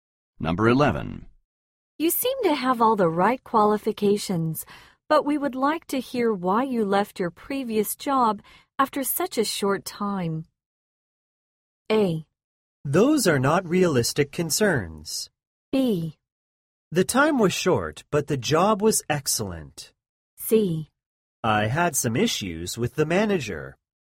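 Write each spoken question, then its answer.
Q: You seem to have all the right qualifications, but we would like to hear why you left your previous job after such a short time.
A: C: I had some issues with the manager.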